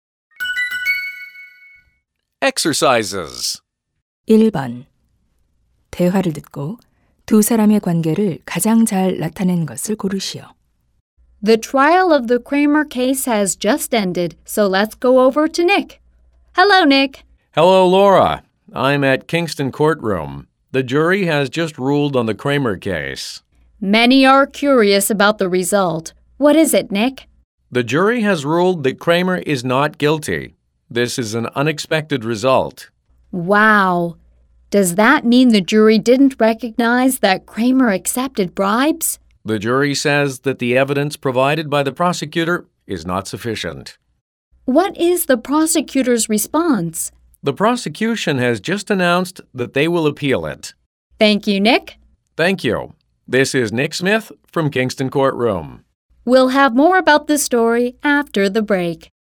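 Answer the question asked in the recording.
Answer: 뉴스 앵커 - 기자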